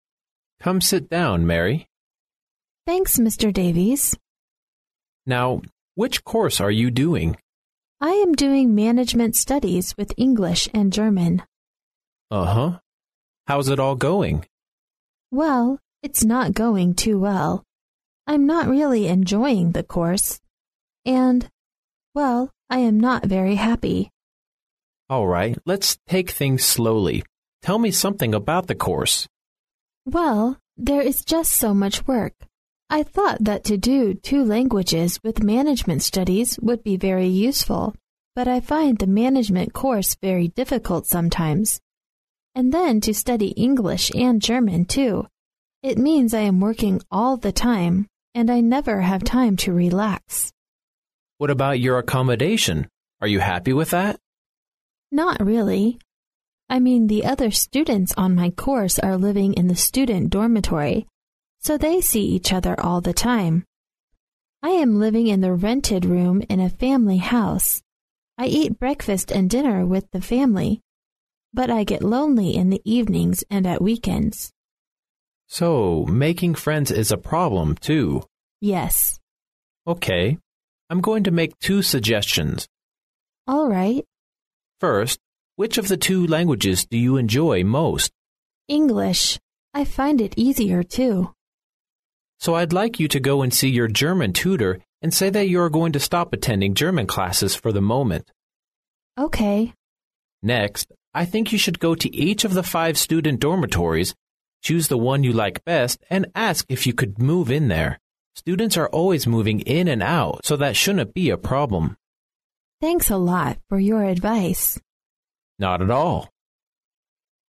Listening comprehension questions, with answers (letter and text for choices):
Questions 14 to 17 are based on the following conversation. At the end of the conversation, you will be given 15 seconds to answer the questions. Now listen to the conversation.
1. Which of the following statements is CORRECT about Mary?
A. She is enjoying her language study.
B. She is enjoying her management study.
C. She is not feeling very well at the moment.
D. She is not happy about her study pressure.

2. What does Mary think of the course initially?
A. It is useful.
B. It is difficult.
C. It is challenging.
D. it is interesting.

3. What is Mary's problem of living in a family house?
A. She dislikes the food she eats.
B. She is unable to sleep well.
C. She has no chance to make friends.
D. She finds the rent high.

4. Which of the following is Mr. Davies' advice?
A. To try to make more friends.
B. To try to change accommodation.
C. To spend more time on English.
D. To stop attending language classes.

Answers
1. D. She is not happy about her study pressure.
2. A. It is useful.
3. C. She has no chance to make friends.
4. B. To try to change accommodation.

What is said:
[听力原文] M: Come sit down, Mary. W: Thanks, Mr. Davies. M: Now, which course are you doing? W: I am doing management studies with English and German. M: Uh-huh. How's it all going? W: Well, it's not going too well. I'm not really enjoying the course. And...well, I am not very happy. M: All right, let's take things slowly. Tell me something about the course. W: Well, there is just so much work. I thought that to do two languages with management studies would be very useful, but I find the management course very difficult sometimes. And then to study English and German too, it means I am working all the time and I never have time to relax. M: What about your accommodation? Are you happy with that? W: Not really. I mean the other students on my course are living in the student dormitory. So they see each other all the time. I am living in the rented room in a family house. I eat breakfast and dinner with the family. But I get lonely in the evenings and at weekends. M: So, making friends is a problem too. W: Yes. I am going to make two suggestions. W: All right. M: First, which of the two languages do you enjoy most? W: English I find it easier too. M: So I'd like you to go and see your German tutor and say that you are going to stop attending German classes for the moment. M: Next, I think you should go to each of the five student dormitories, choose the one you like best and ask if you could move in there. Students are always moving in and out so that shouldn't be a problem. W: Thanks a lot for your advice. M: Not at all.